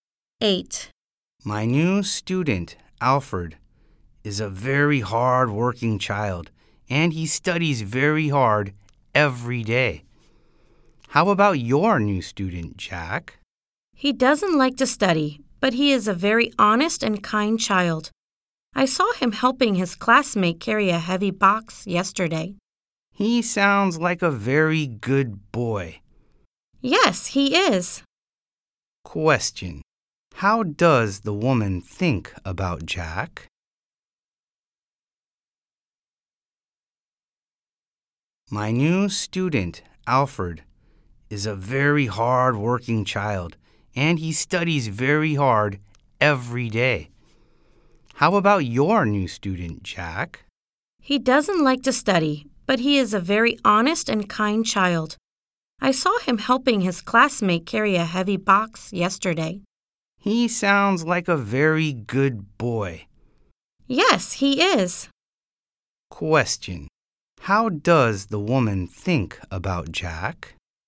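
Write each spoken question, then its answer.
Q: How does the woman think about Jack?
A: He is honest and kind.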